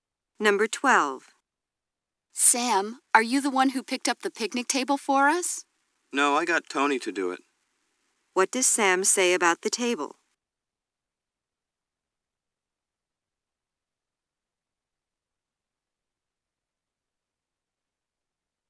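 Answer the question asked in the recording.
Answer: Tony picked it up.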